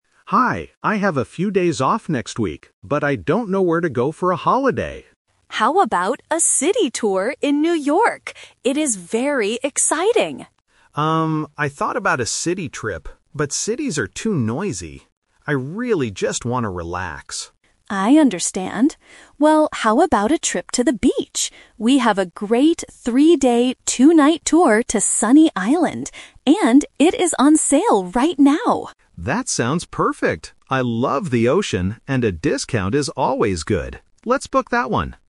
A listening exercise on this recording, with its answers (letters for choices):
Listen to the conversation and choose the correct answer (A, B, or C).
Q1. Where does the travel agent suggest going first?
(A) To the beach.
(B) To the mountains.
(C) To a city.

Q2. Why does the customer refuse the first suggestion?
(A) Because it is too expensive.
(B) Because it is too noisy.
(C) Because he doesn't have enough time.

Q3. Why is the beach tour a good choice right now?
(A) It is very quiet.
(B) It is on sale.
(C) It is a five-day trip.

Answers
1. C
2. B
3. B

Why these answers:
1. The agent first asks, "How about a city tour in New York?". Option A is the Trap because the beach is their final decision, not the first suggestion. Option B is never mentioned.
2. The customer says, "...but cities are too noisy. I really just want to relax." Option A and Option C are logical reasons for refusing a trip, but they are not mentioned in the audio.
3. The agent suggests the beach tour and adds, "And it is on sale right now!" (a sale means there is a discount). Option A is a Trap; the customer wants to relax, but the agent specifically highlights the sale. Option C is a Trap using wrong numbers; the tour is only for three days, not five.

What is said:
Customer: Hi, I have a few days off next week, but I don't know where to go for a holiday.
Agent: How about a city tour in New York? It is very exciting.
Customer: Um, I thought about a city trip, but cities are too noisy. I really just want to relax.
Agent: I understand. Well, how about a trip to the beach? We have a great three-day, two-night tour to Sunny Island. And it is on sale right now!
Customer: That sounds perfect! I love the ocean, and a discount is always good. Let's book that one.